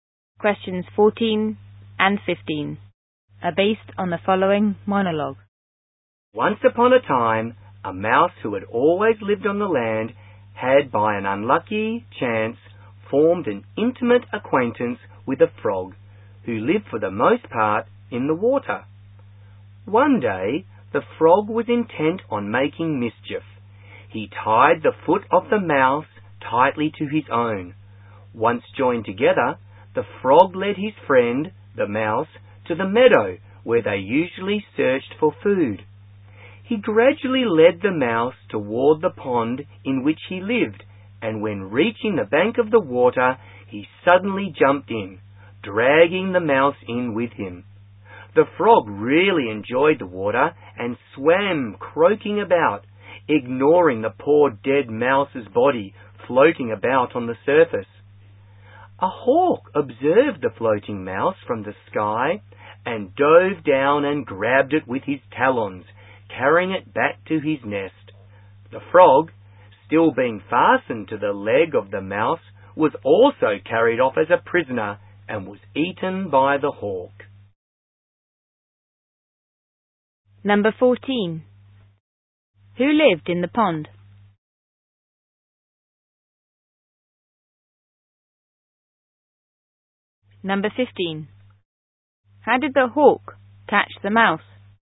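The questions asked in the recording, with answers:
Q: Who lived in the pond?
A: The frog

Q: How did the hawk catch the mouse?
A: It dove down and grabbed the floating mouse with its talons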